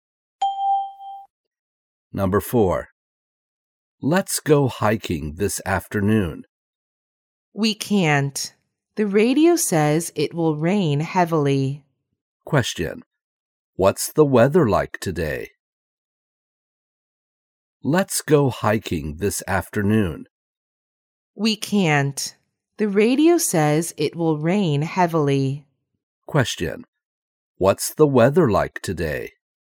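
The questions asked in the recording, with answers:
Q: Question. What's the weather like today?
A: It will rain heavily.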